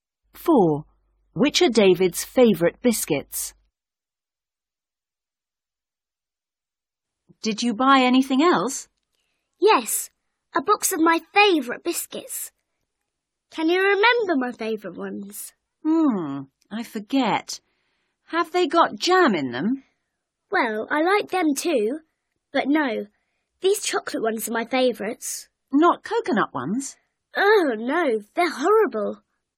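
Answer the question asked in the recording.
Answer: chocolate ones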